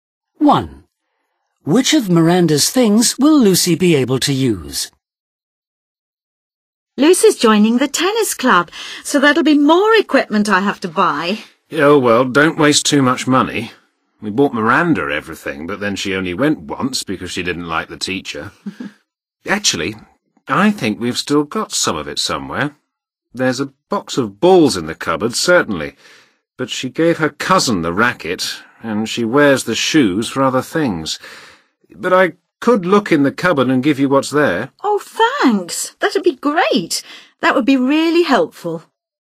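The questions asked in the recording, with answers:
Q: Which of Miranda's things will Lucy be able to use?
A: the tennis balls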